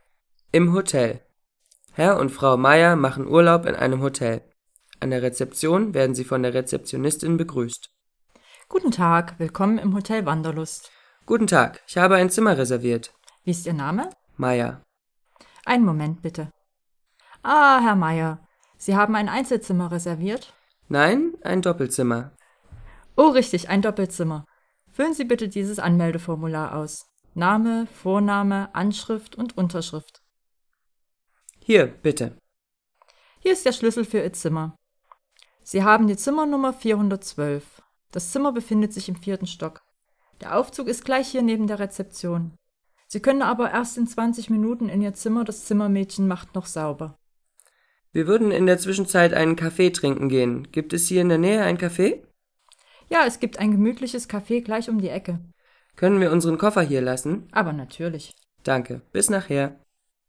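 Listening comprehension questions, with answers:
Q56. Was für ein Zimmer hat Herr Meyer reserviert?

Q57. Warum fragt Herr Meyer nach einem Café?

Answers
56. Ein Doppelzimmer
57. Weil sie erst in 20 Minuten ins Zimmer können und in der Zwischenzeit einen Kaffee trinken wollen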